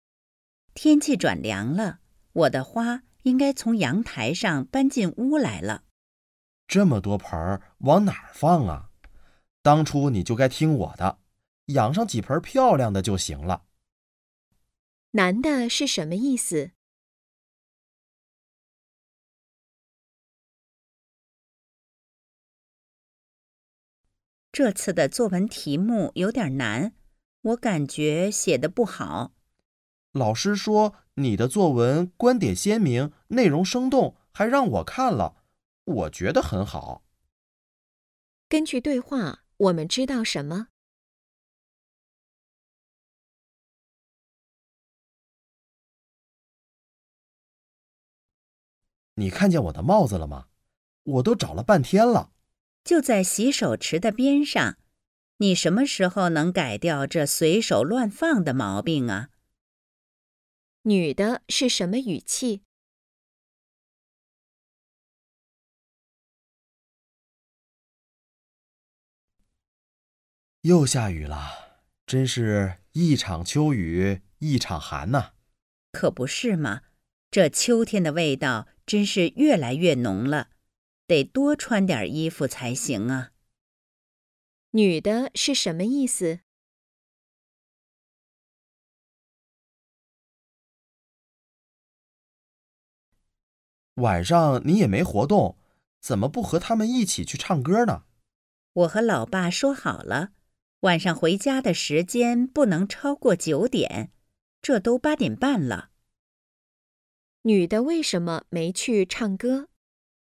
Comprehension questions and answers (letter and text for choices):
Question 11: 男的是什么意思?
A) 花不够漂亮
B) 女的不会养花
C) 花的数量太多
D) 不用把花搬进屋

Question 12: 根据对话,我们知道什么?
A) 男的也是一位老师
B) 女的没有写好作文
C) 老师觉得作文题较难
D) 男的跟老师观点一致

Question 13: 女的是什么语气?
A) 同情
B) 批评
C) 疑问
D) 讽刺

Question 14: 女的是什么意思?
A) 应该买衣服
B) 还没到秋天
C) 有奇怪的味道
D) 天气越来越冷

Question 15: 女的为什么没去唱歌?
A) 没时间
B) 不想去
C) 要去看爸爸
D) 有别的安排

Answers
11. C) 花的数量太多
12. D) 男的跟老师观点一致
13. B) 批评
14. D) 天气越来越冷
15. A) 没时间

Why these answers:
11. 男的感慨"这么多盆往哪儿放啊",是说花的数量太多,不是否定把花搬进屋的建议;男的说"当初你就该听我的,养上几盆漂亮的就行了",是说女的应该选择一些花来养,不是说现在的花不漂亮,也不是嫌弃女的不会养花,本质上还是觉得花太多。故选项C正确,其他选项均错误。
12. 女的认为自己没写好作文,男的说她的作文写得很好,并转述老师的话进行肯定,说明他跟老师的观点一致,选项D正确。选项A无法从对话中推断出,选项B、C与对话内容不符。
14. "一场秋雨一场寒"是一句谚语,意思是秋天的天气会随着每一次降雨而变得愈发寒冷,女的用"可不是嘛"表示同意对方的观点,故选项D正确。根据对话无法推断出现在还没到秋天;"味道"在这里不是指香、臭一类的味道,而是指气息、感觉;"多穿点儿衣服"不是说要买衣服。所以选项A、B、C均不正确。
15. 按女的跟爸爸的约定,她要在九点前回家,而"这都八点半了",说明只剩半个小时,没时间了,这是她没去唱歌的原因,选项A正确。其他3项都与对话内容不符。

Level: 汉语水平考试(MHK)三级